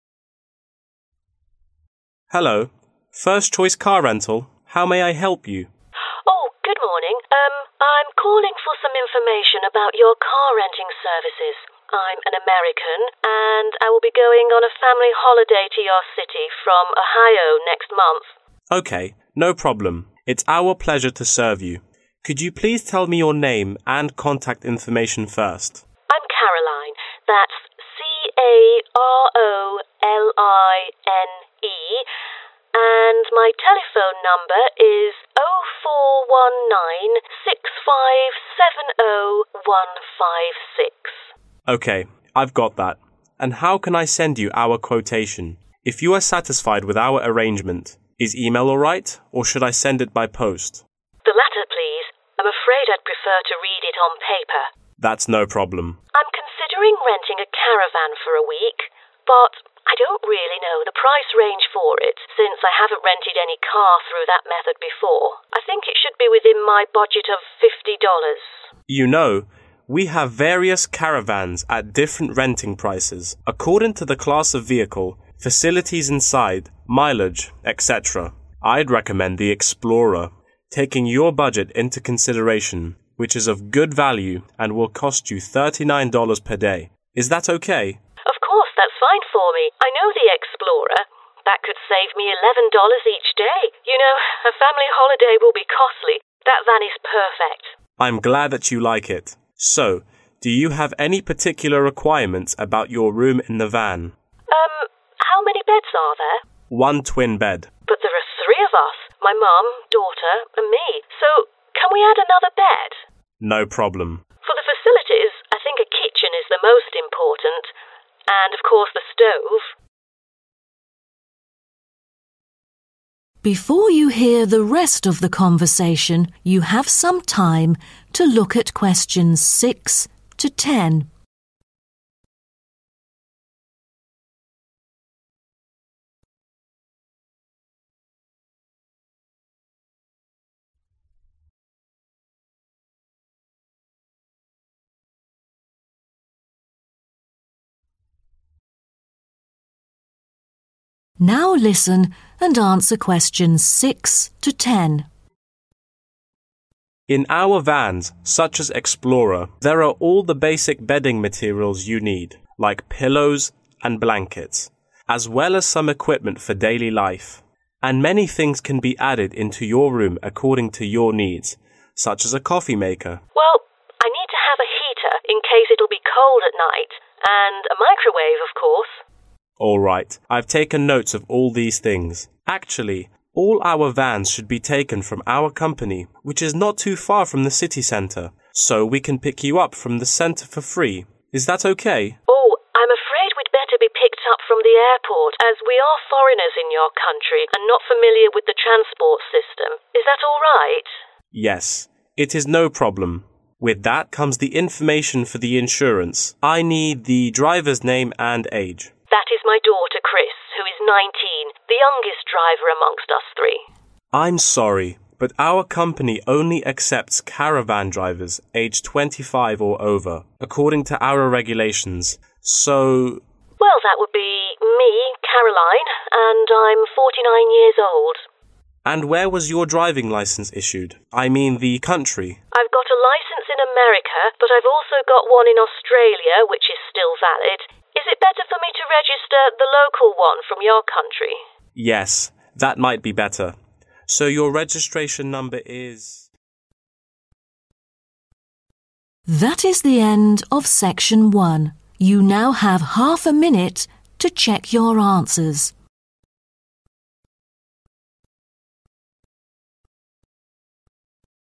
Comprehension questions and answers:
Complete the notes below. Write ONE WORD AND/OR A NUMBER for each answer.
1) Contact number: 1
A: 04196570156

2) Send written quote by: 2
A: post

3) Price for renting: 3 daily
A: 39 dollars/$39

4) an extra 4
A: bed

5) most important facility: 5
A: kitchen

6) they should have a 6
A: heater

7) as well as a 7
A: microwave

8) Pick them up from the 8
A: airport

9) The caravan driver's age: 9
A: 49

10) The registered licence issued in: 10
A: Australia

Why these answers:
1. Trong bài nghe, Caroline cung cấp trực tiếp số điện thoại của mình.
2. Người phụ nữ yêu cầu báo giá gửi bằng đường bưu điện thay vì email.
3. Giá thuê là $39 mỗi ngày, phù hợp với ngân sách của Caroline là $50.
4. Caroline yêu cầu thêm giường do có 3 người, trong khi xe chỉ có 1 giường đôi.
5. Cô ấy nhấn mạnh bếp là tiện nghi quan trọng nhất.
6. Cô ấy muốn có thêm máy sưởi đề phòng trời lạnh.
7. Thêm một thiết bị nữa là lò vi sóng.
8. Họ yêu cầu được đón từ sân bay thay vì trung tâm thành phố.
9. Chris 19 tuổi không đủ điều kiện, vì vậy Caroline (49 tuổi) sẽ lái.
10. Caroline có bằng lái Mỹ và Úc, và được khuyên dùng bằng lái của Úc vì địa phương hơn.